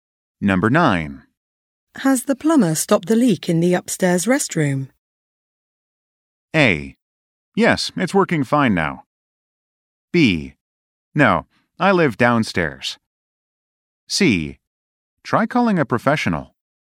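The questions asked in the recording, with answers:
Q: Has the plumber stopped the leak in the upstairs restroom?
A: A: Yes, it's working fine now.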